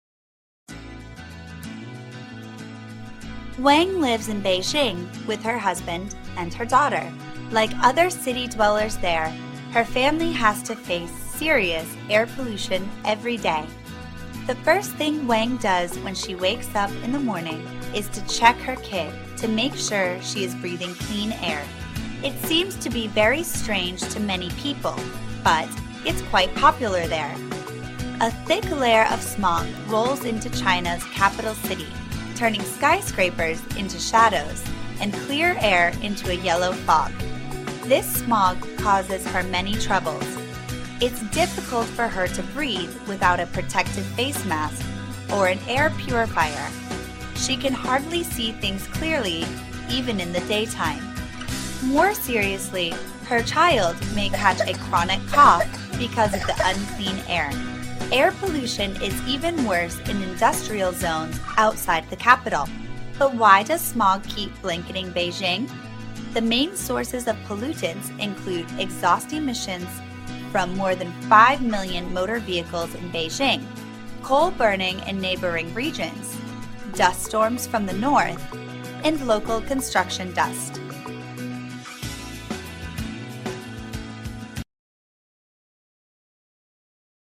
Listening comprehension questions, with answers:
Task: Decide if each sentence is True (T) or False (F)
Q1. Wang's family lives in Shanghai.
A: False

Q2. Smog in Beijing makes it hard to see clearly.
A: True

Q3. Wang's child may suffer from coughing problems.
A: True

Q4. The pollution is mainly caused by cars, coal, and dust.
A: True

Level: lớp 9